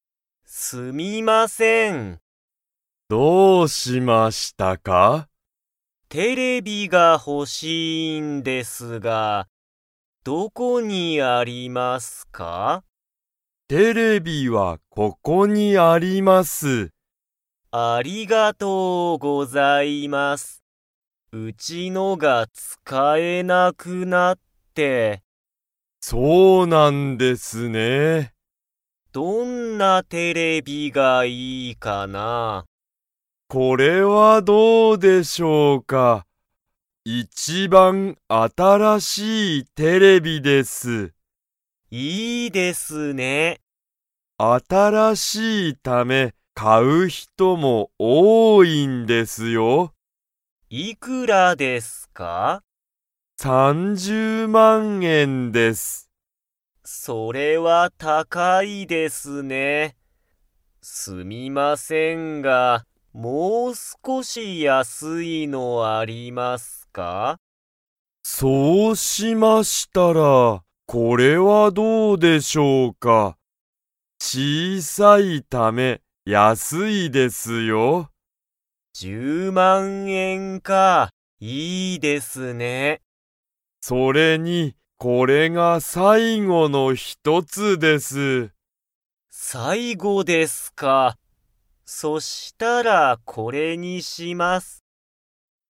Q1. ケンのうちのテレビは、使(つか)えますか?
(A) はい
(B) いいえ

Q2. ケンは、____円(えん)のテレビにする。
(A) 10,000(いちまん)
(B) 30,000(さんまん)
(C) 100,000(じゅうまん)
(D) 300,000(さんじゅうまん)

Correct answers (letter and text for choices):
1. (B) いいえ
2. (C) 100,000(じゅうまん)

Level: Level 2